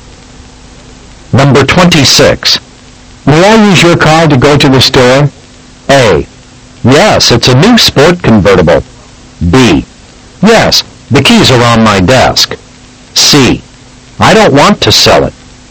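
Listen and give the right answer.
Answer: B: Yes. The keys are on my desk.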